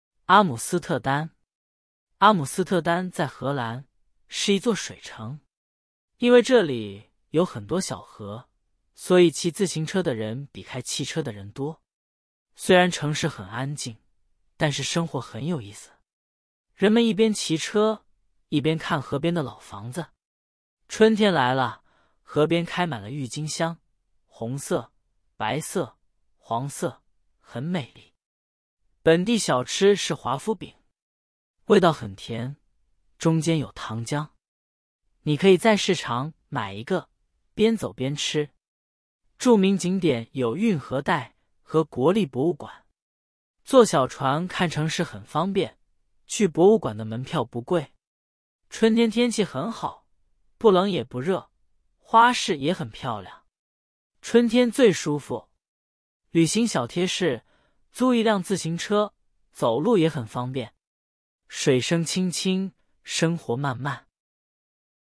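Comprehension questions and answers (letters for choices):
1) 阿姆斯特丹是一座什么城市?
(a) 山城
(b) 水城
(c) 花城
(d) 古城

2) 人们一边骑车, 一边看什么?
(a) 老房子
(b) 汽车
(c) 博物馆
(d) 市场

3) 华夫饼中间有什么?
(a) 奶油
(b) 糖浆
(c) 巧克力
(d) 果酱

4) 以下哪个是著名景点?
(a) 运河带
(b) 长城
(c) 埃菲尔铁塔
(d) 金字塔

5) 春天天气怎么样?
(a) 很冷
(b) 很热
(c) 不冷也不热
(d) 又冷又热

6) 旅行小贴士建议做什么?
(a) 租汽车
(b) 租自行车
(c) 坐飞机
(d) 坐火车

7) 阿姆斯特丹在法国。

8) 骑自行车的人比开汽车的人少。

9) 春天河边开满了郁金香。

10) 华夫饼的味道很咸。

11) 去博物馆的门票很贵。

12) 春天天气很舒服。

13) 阿姆斯特丹在哪个国家?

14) 为什么骑自行车的人比开汽车的人多?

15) 春天河边开满了什么花?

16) 本地小吃是什么? 味道怎么样?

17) 旅行小贴士是什么?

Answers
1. b
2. a
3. b
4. a
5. c
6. b
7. 错
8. 错
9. 对
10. 错
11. 错
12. 对
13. 荷兰
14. 因为这里有很多小河
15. 郁金香
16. 华夫饼,味道很甜
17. 租一辆自行车

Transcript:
阿姆斯特丹
阿姆斯特丹在荷兰,是一座水城。因为这里有很多小河,所以骑自行车的人比开汽车的人多。
虽然城市很安静,但是生活很有意思。人们一边骑车,一边看河边的老房子。春天来了,河边开满了郁金香,红色、白色、黄色,很美丽。
本地小吃是华夫饼。味道很甜,中间有糖浆。你可以在市场买一个,边走边吃。
著名景点有运河带和国立博物馆。坐小船看城市很方便,去博物馆的门票不贵。春天天气很好,不冷也不热,花市也很漂亮。
春天最舒服。旅行小贴士:租一辆自行车,走路也很方便。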